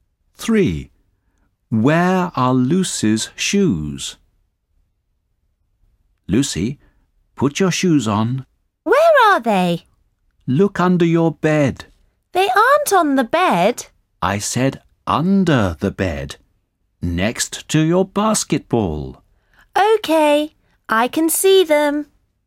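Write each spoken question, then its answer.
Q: Where are Lucy's shoes?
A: Under the bed, next to her basketball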